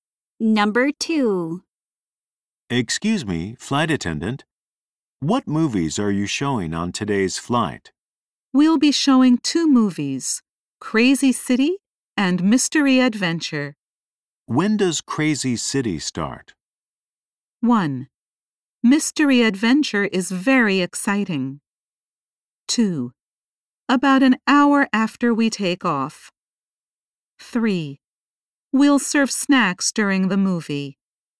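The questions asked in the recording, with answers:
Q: When does Crazy City start?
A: 2: About an hour after we take off.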